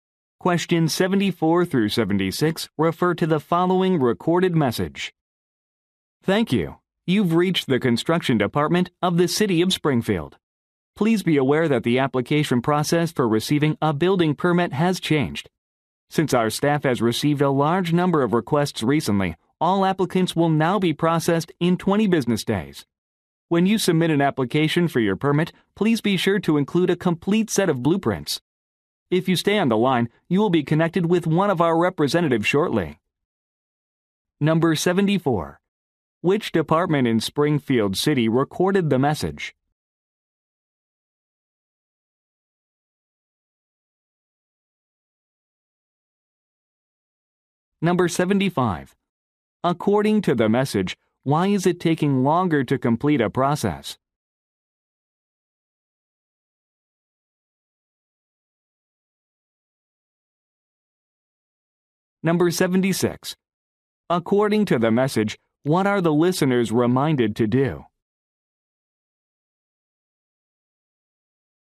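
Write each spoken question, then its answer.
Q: Which department in Springfield City recorded the message?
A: The construction department

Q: According to the message, why is it taking longer to complete a process?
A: The staff has received a large number of requests

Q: According to the message, what are the listeners reminded to do?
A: Include a complete set of blueprints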